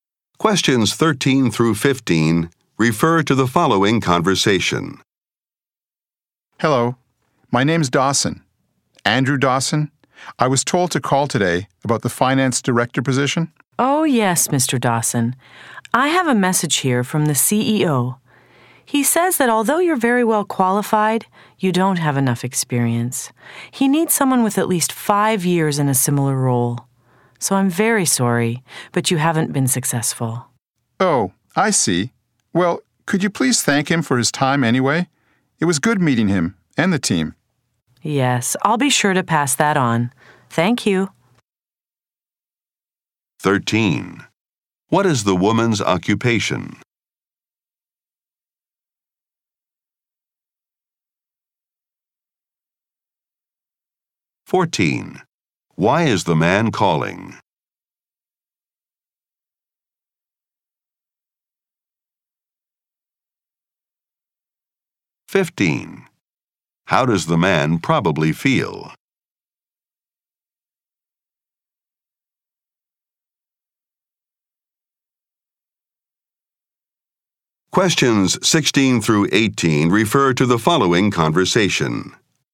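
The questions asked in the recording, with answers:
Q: Why is the man calling?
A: To find out about the finance director position

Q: How does the man probably feel?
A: Disappointed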